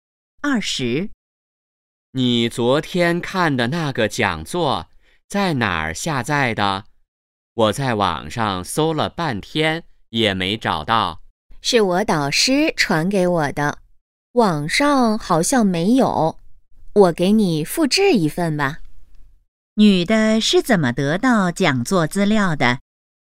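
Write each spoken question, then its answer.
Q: 女的是怎么得到讲座资料的?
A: 导师传给她的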